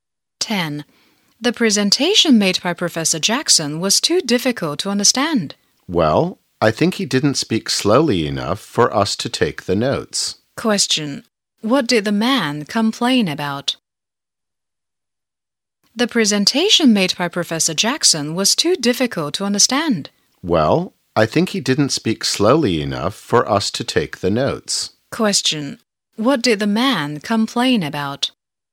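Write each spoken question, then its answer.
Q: What did the man complain about?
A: The professor spoke too fast to take notes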